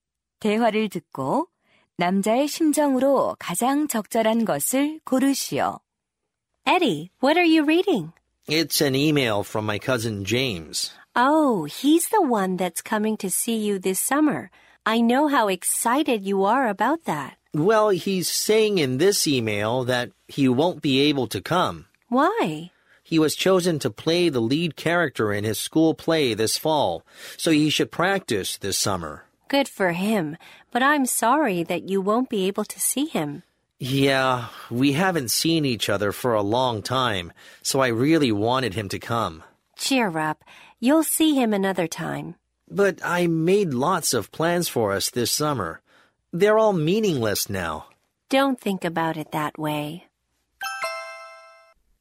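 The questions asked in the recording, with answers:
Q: 대화를 듣고 남자의 심정으로 가장 적절한 것을 고르시오.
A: 실망한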